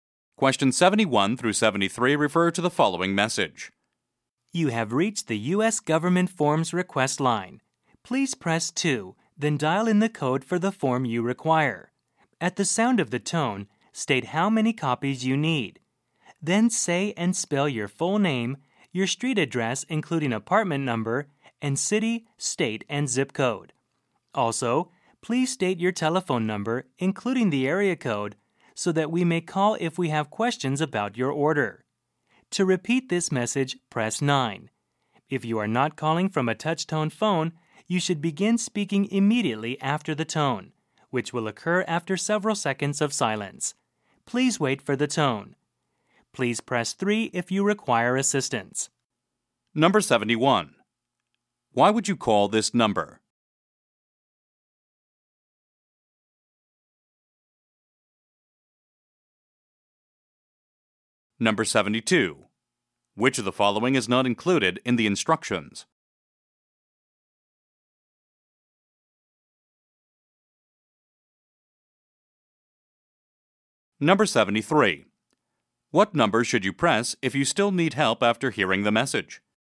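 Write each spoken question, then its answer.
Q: Why would you call this number?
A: To order U.S. government forms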